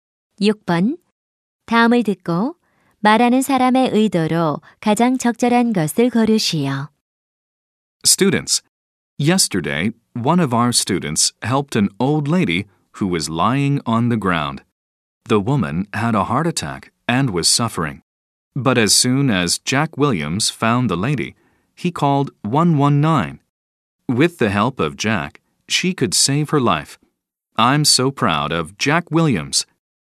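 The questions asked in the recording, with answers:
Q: 다음을 듣고 말하는 사람의 의도로 가장 적절한 것을 고르시오.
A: 칭찬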